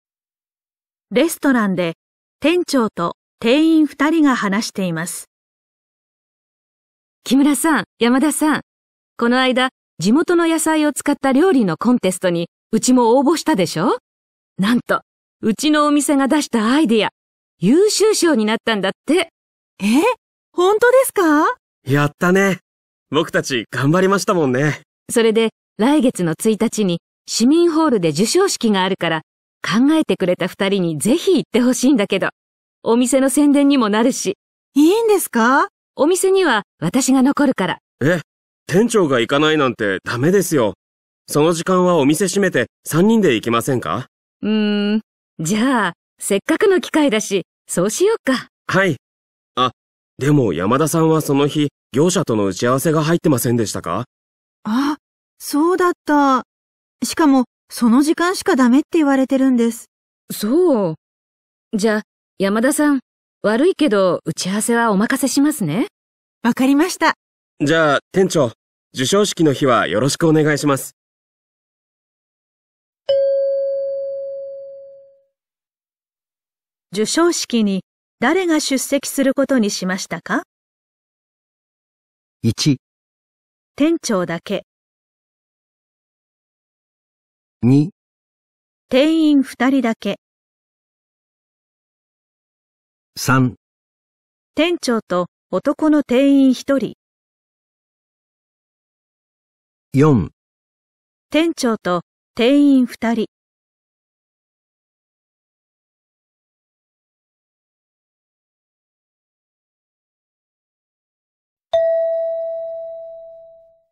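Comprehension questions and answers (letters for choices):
問題 5 では長めの話を聞きます。この問題には練習はありません。メモをとってもかまいません。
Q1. 授賞式に誰が出席することにしましたか。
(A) 店長だけ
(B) 店員2人だけ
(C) 店長と男の店員1人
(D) 店長と店員2人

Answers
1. C

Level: N2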